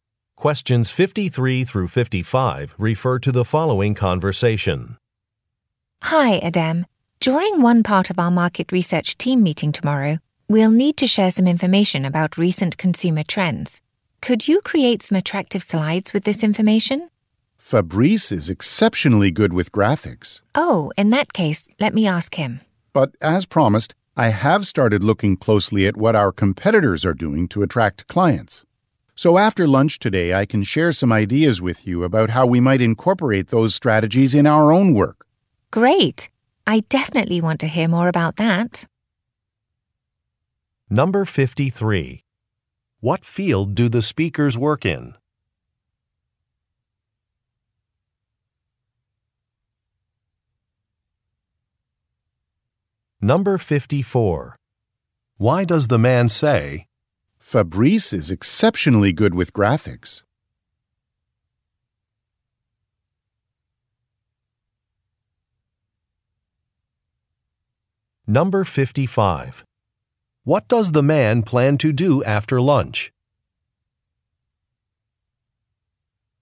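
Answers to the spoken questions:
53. Market research
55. Share ideas about competitors' strategies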